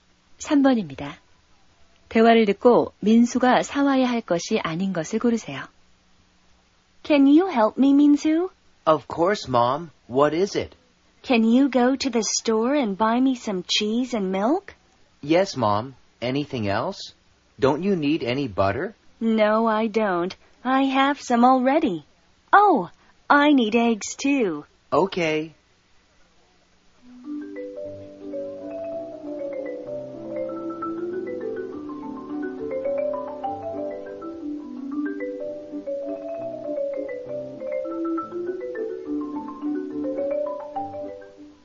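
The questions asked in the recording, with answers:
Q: 대화를 듣고 민수가 사와야 할 것이 아닌 것을 고르세요.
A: 버터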